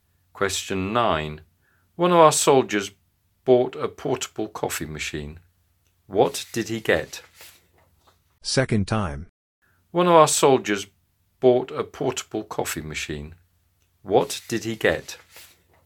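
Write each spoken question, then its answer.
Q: What did he get?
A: A portable coffee machine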